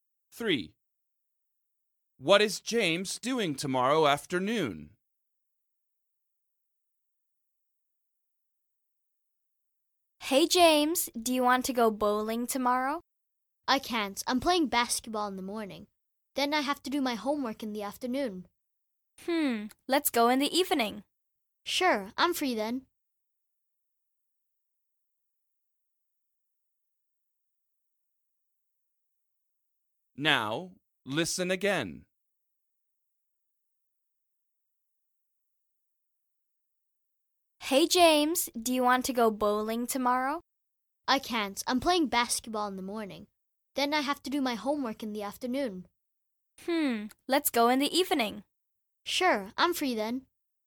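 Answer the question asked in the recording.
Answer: His homework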